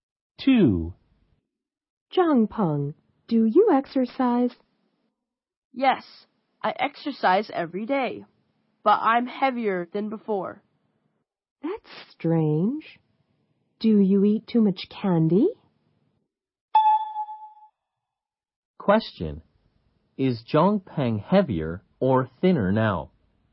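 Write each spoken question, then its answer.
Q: Is Zhang Peng heavier or thinner now?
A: Heavier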